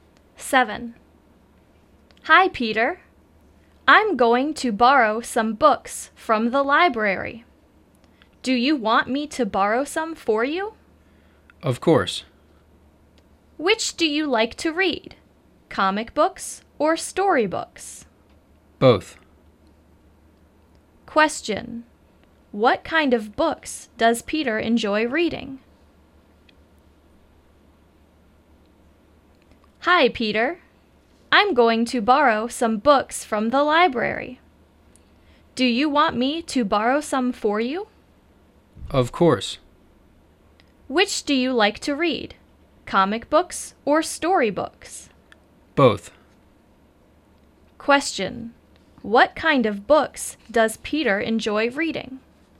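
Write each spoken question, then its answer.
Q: What kind of books does Peter enjoy reading?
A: Both comic books and storybooks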